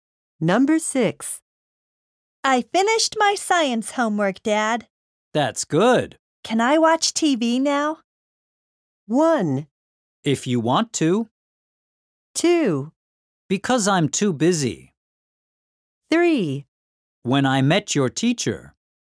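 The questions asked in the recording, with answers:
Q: Can I watch TV now?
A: 1: If you want to.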